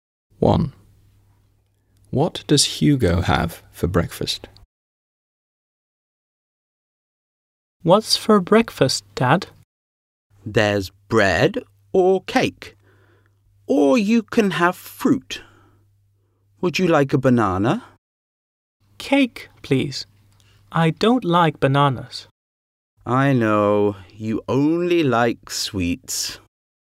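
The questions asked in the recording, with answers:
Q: What does Hugo have for breakfast?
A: cake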